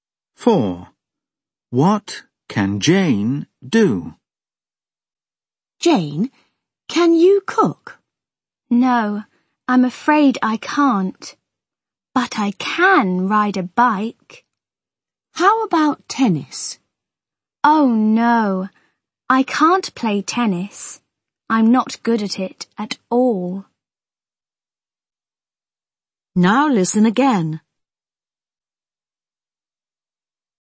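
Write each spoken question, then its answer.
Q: What can Jane do?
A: She can ride a bike.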